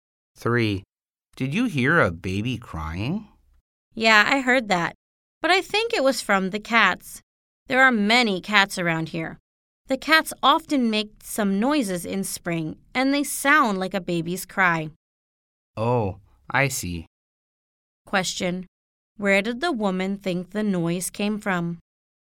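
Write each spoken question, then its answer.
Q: Where did the woman think the noise came from?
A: From the cats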